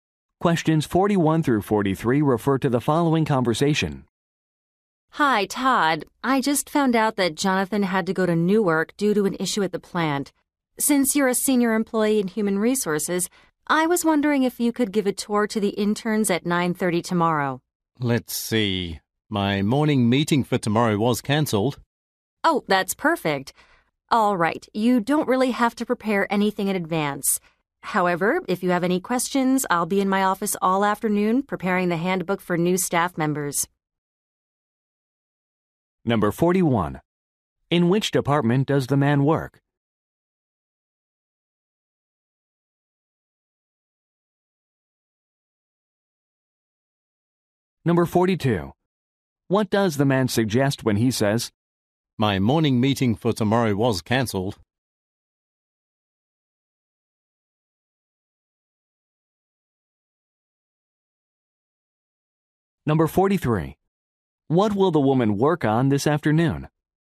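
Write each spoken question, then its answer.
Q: In which department does the man work?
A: Human resources

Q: What does the man suggest when he says,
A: He is available to give the tour

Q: What will the woman work on this afternoon?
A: A handbook for new staff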